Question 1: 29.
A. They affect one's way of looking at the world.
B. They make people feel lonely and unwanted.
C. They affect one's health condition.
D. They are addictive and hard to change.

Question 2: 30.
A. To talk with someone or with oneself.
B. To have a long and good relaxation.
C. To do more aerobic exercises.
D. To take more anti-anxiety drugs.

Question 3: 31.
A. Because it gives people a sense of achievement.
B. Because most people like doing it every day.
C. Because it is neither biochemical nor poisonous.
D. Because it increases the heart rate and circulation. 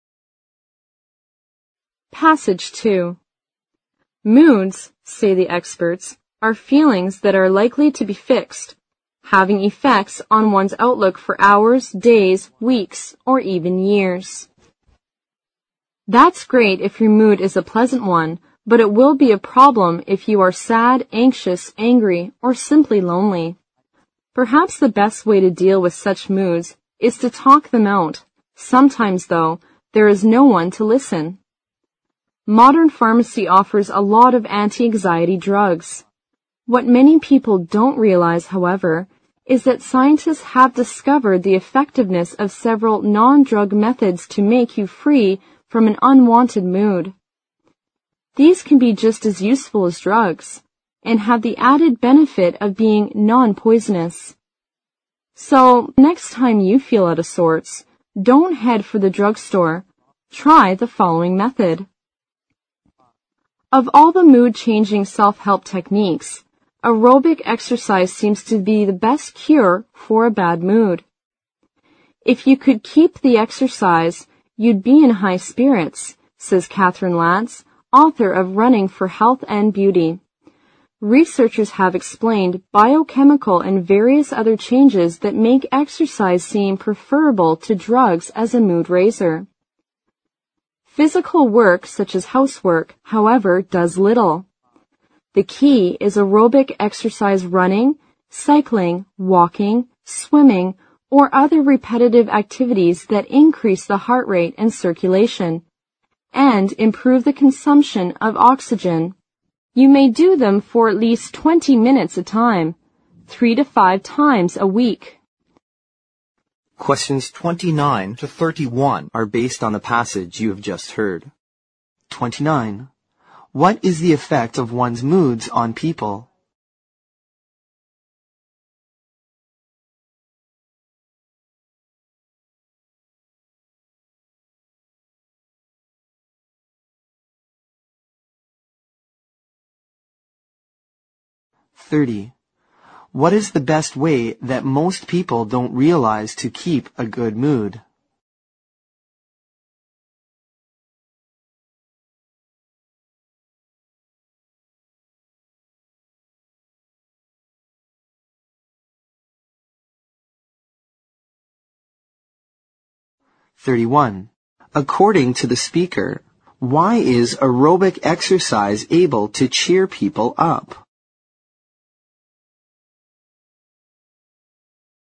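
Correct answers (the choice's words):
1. They affect one's way of looking at the world.
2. To do more aerobic exercises.
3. Because it increases the heart rate and circulation.

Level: 六级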